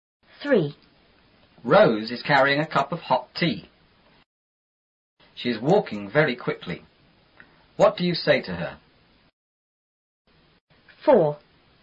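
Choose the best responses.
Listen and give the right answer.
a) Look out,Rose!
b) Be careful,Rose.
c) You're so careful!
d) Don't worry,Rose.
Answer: b) Be careful,Rose.

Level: 初中英语广州版4B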